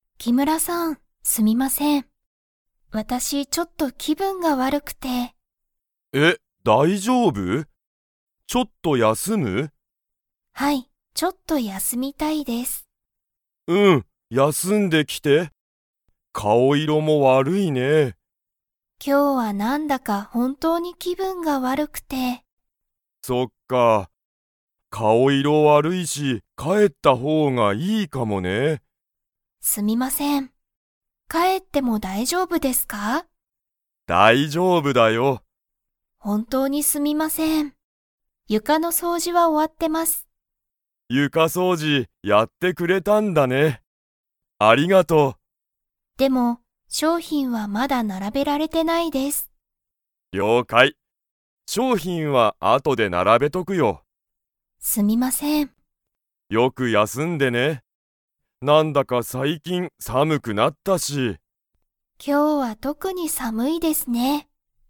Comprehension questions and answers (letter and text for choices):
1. 田中たなかさんはどこの掃除そうじをやりましたか?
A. トイレ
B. 床ゆか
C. 商品しょうひん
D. 家いえ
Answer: B. 床ゆか

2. 田中たなかさんは 。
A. 帰かえる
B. 帰かえらない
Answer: A. 帰かえる

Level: Level 4